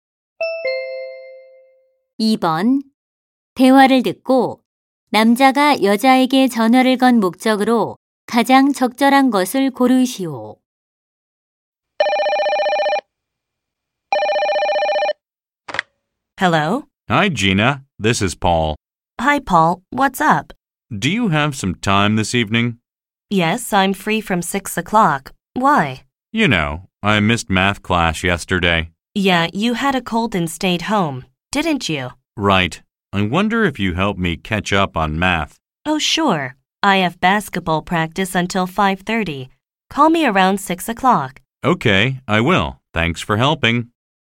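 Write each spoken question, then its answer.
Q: 대화를 듣고 남자가 여자에게 전화를 건 목적으로 가장 적절한 것을 고르시오.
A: 수학 공부를 도와 달라고 부탁하려고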